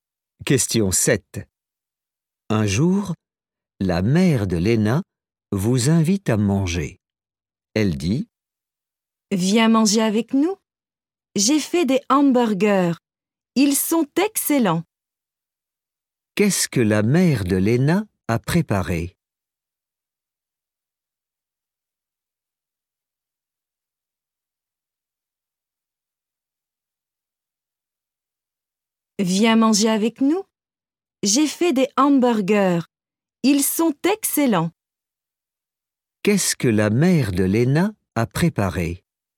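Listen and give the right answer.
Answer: des hamburgers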